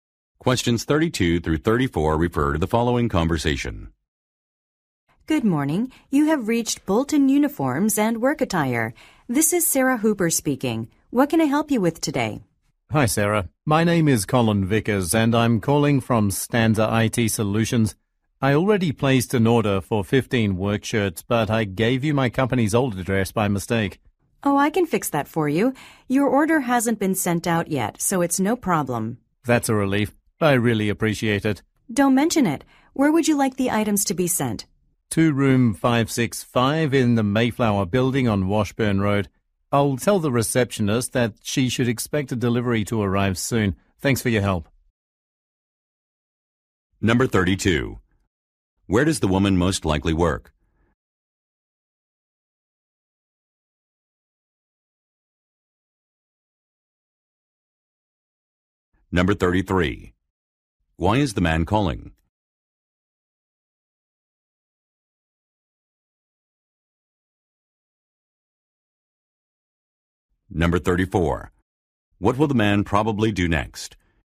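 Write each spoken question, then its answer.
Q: Where does the woman most likely work?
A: At a uniform and work clothing company (Bolton Uniforms and Work Attire)

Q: Why is the man calling?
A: To correct the delivery address on his order

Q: What will the man probably do next?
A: Tell the receptionist to expect a delivery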